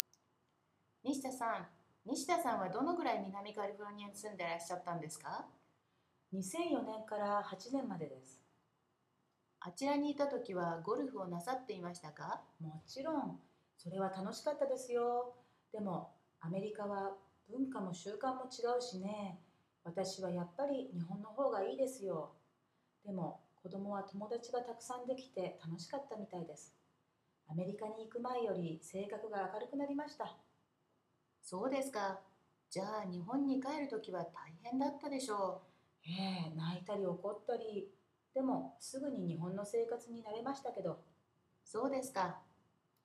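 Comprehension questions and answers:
Listen to the conversations and answer the questions in English.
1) Who is B?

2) How long was B in California?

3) What does A inquire?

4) What does B think about life in California? What about her child?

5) What did B's child do when the family was about to return to Japan?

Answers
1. Mr./Ms. Nishida, who lived in Southern California
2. From 2004 to 2008 (about four years)
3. Whether B played golf while living there
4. It was fun, but the culture and customs are different, so B prefers Japan; the child made many friends, enjoyed it and became more cheerful
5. Cried and got angry, but soon got used to life in Japan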